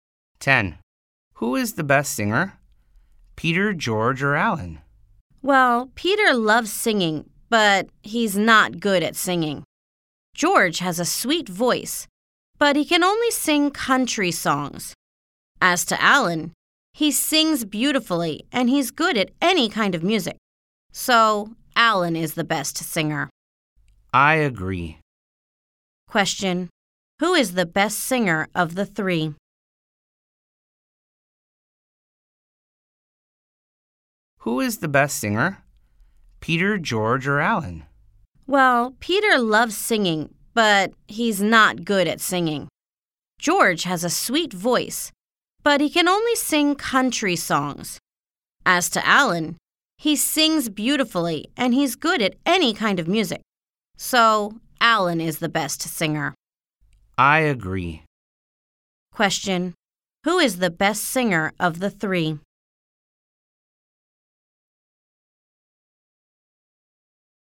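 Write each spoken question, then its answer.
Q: Who is the best singer of the three?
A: Alan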